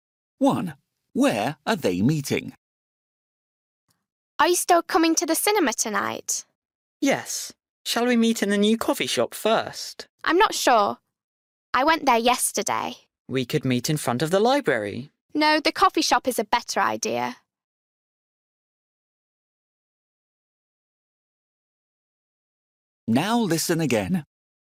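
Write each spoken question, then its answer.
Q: where are they meeting?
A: In the new coffee shop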